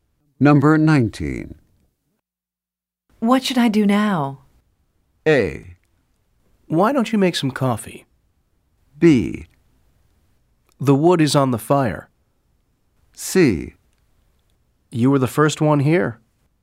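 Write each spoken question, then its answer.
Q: What should I do now?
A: A: Why don't you make some coffee?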